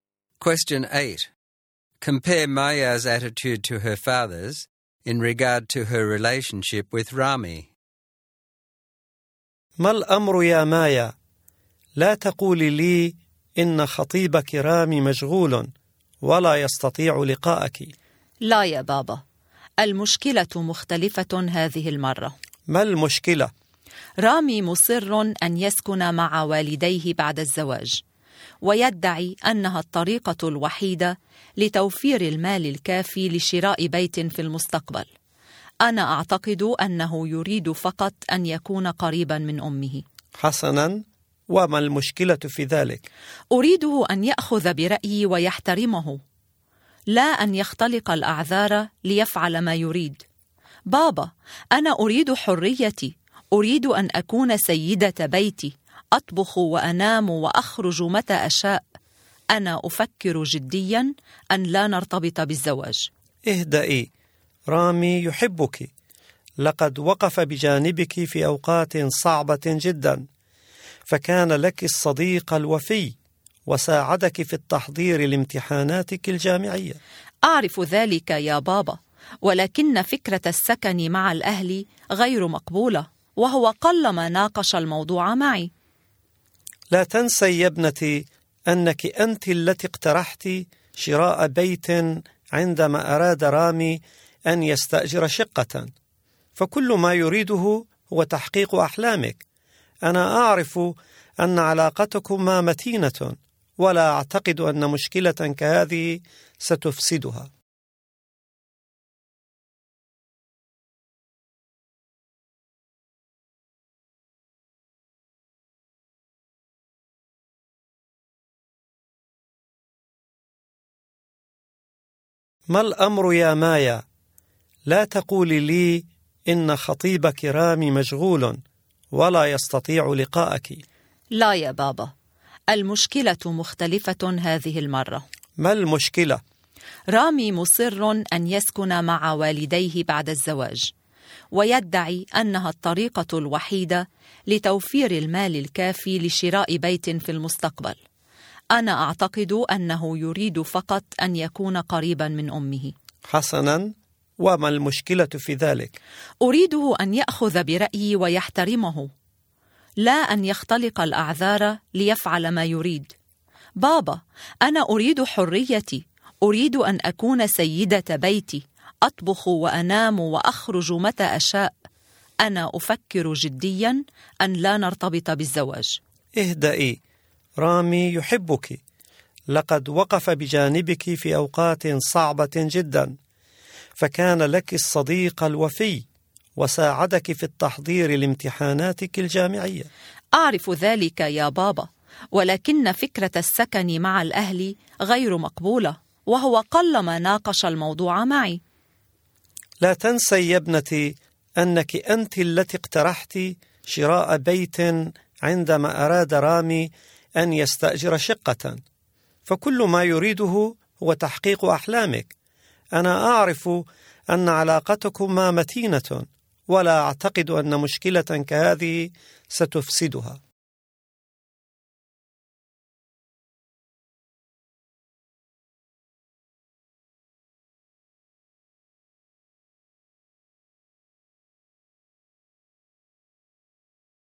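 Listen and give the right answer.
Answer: Maya is upset and is thinking of not marrying Rami because he insists on living with his parents and does not respect her views. Her father is calm and supportive of Rami: he says Rami loves her, wants to make her dreams come true, and that their relationship is strong.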